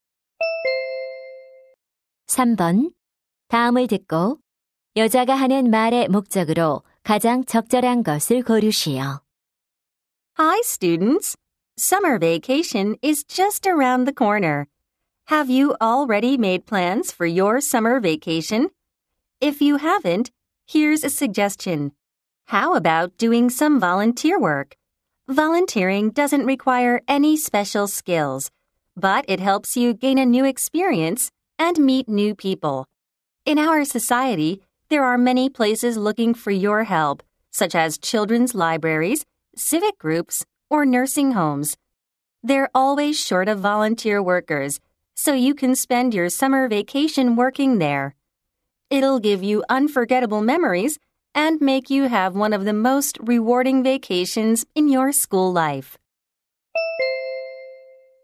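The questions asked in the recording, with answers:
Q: 다음을 듣고 여자가 하는 말의 목적으로 가장 적절한 것을 고르시오.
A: 여름방학 동안 자원봉사 활동을 권장하려고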